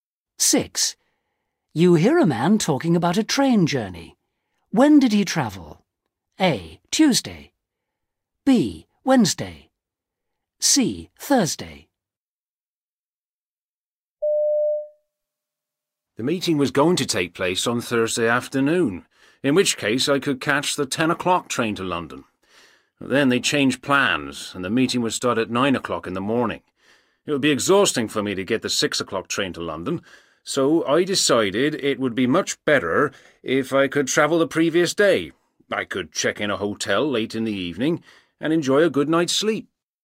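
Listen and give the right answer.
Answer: B: Wednesday.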